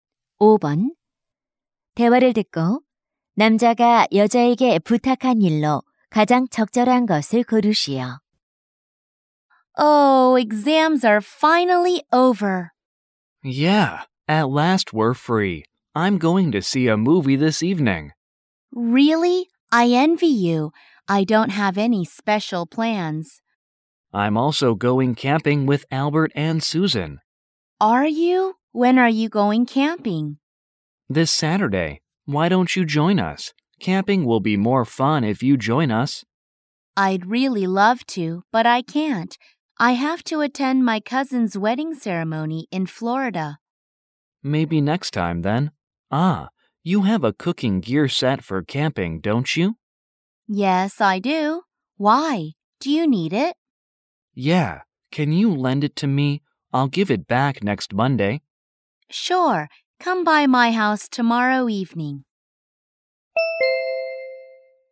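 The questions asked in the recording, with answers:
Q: 대화를 듣고 남자가 여자에게 부탁한 일로 가장 적절한 것을 고르시오.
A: 캠핑용 조리 도구 세트 빌려 주기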